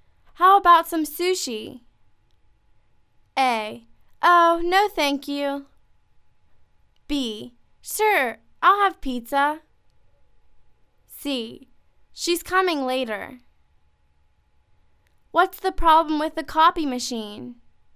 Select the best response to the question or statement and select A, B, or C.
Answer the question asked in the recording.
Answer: Oh, no thank you